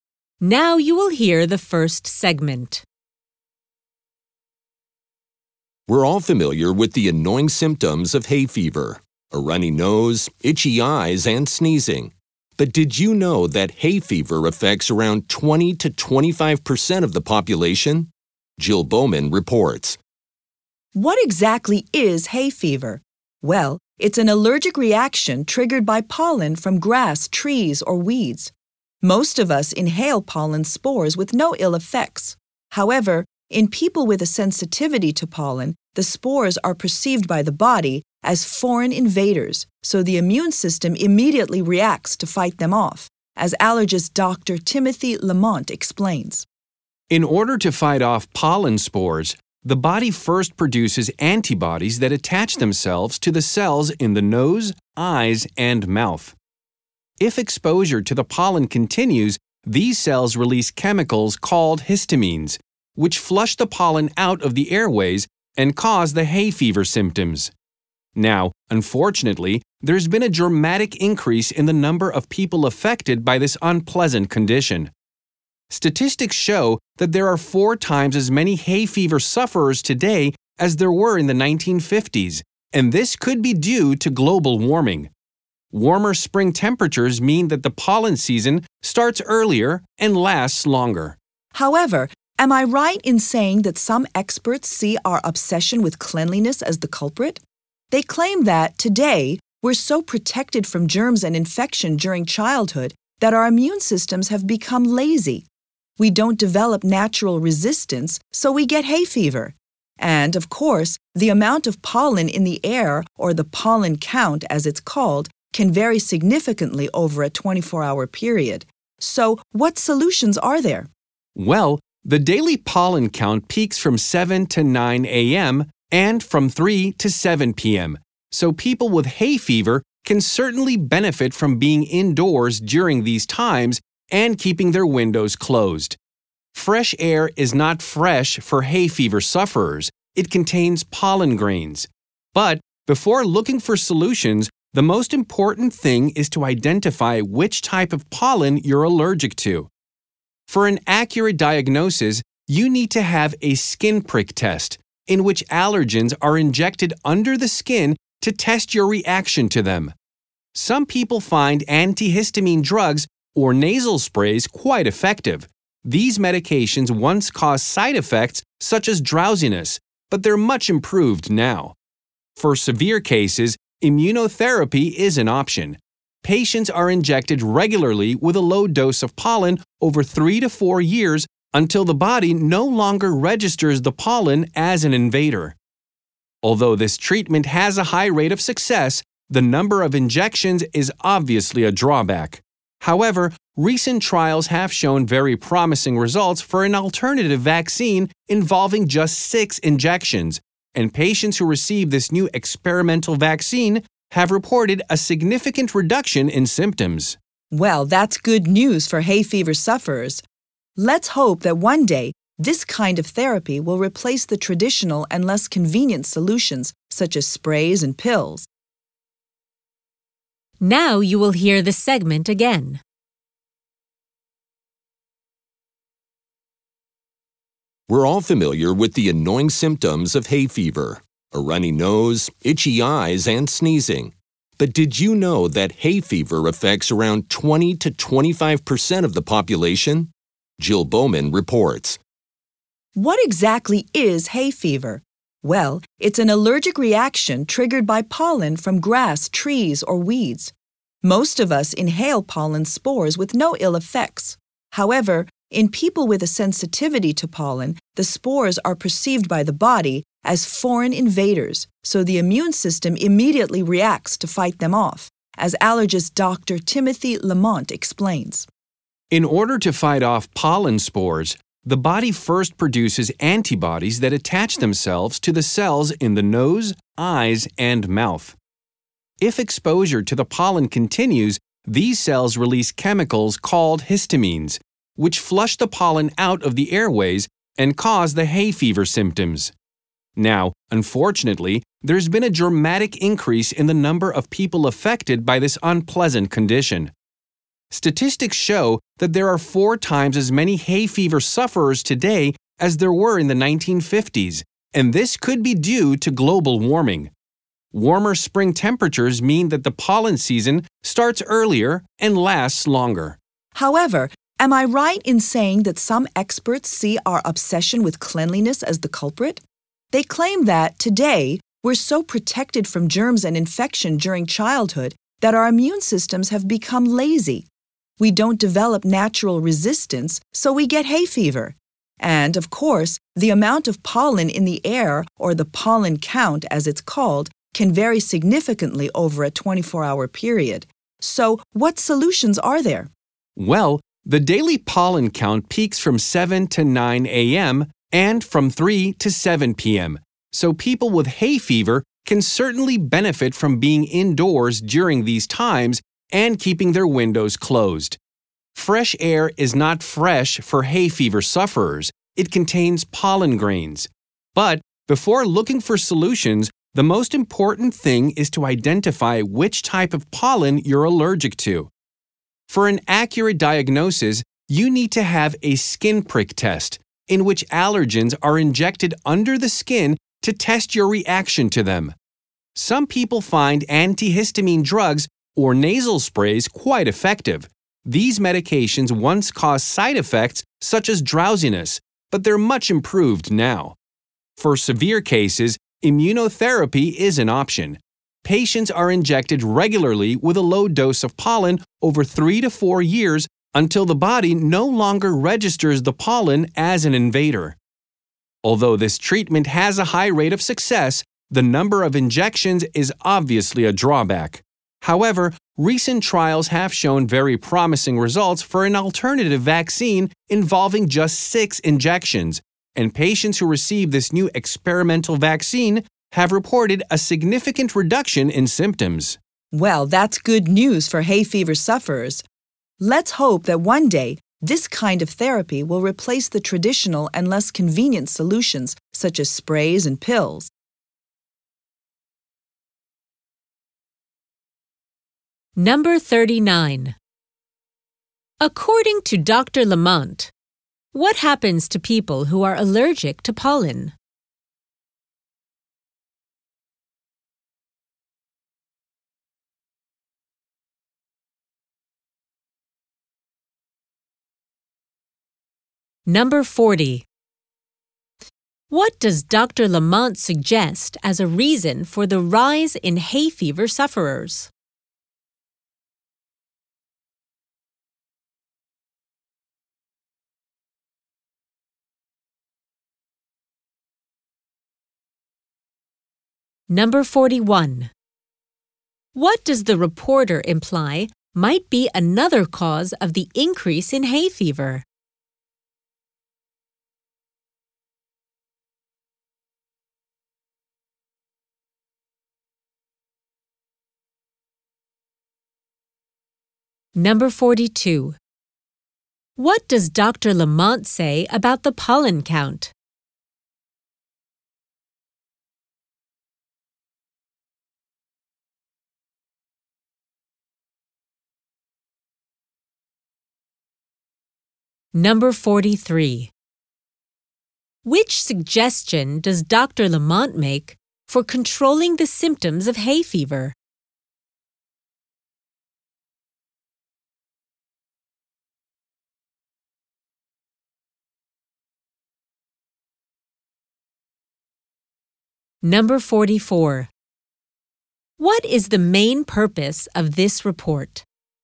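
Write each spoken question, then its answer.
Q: According to Dr. Lamont, what happens to people who are allergic to pollen?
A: Their body treats pollen as an invader: it makes antibodies, then histamines that cause the symptoms

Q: What does Dr. Lamont suggest as a reason for the rise in hay fever sufferers?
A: Global warming (longer pollen seasons)

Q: What does the reporter imply might be another cause of the increase in hay fever?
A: Our obsession with cleanliness makes immune systems lazy

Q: What does Dr. Lamont say about the pollen count?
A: It varies a lot over 24 hours and peaks from 7 to 9 a.m. and 3 to 7 p.m.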